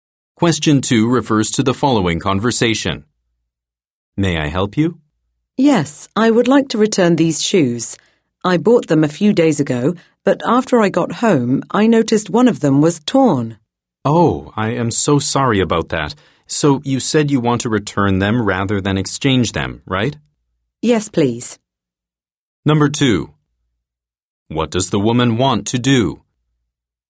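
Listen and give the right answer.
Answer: Return the shoes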